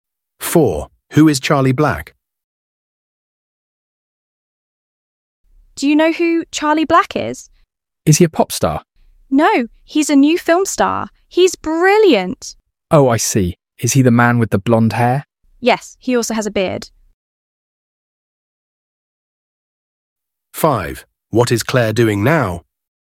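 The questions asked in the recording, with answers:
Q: Who is Charlie Black?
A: A new film star with blonde hair and a beard.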